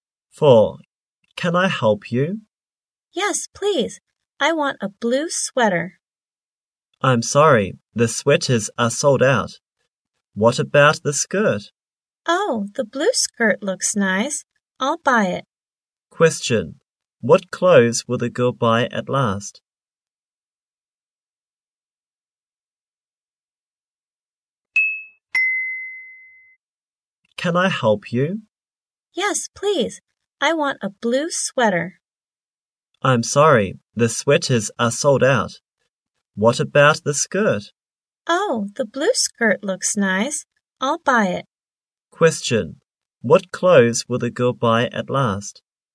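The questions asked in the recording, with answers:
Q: Question. What clothes will the girl buy at last?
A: The blue skirt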